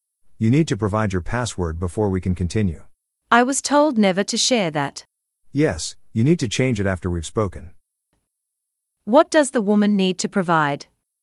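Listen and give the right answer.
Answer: her password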